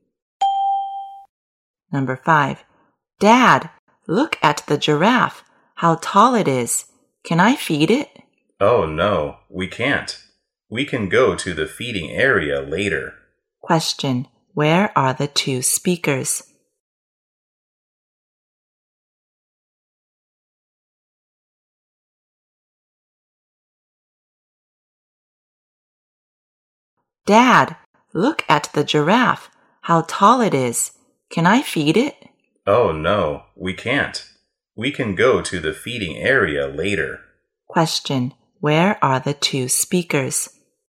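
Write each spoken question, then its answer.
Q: where are the two speakers?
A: At the zoo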